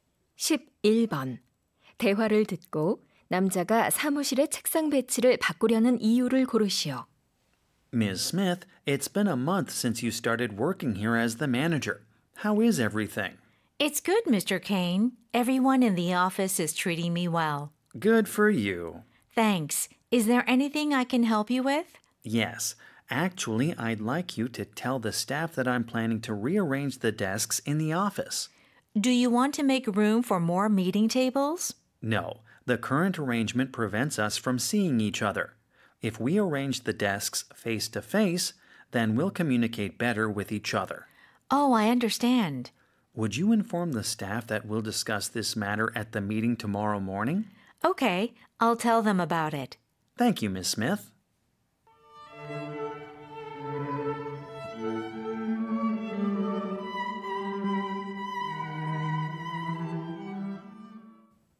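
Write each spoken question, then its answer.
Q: 대화를 듣고 남자가 사무실의 책상 배치를 바꾸려는 이유를 고르시오.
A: 직원들이 서로 더 잘 소통하게 하려고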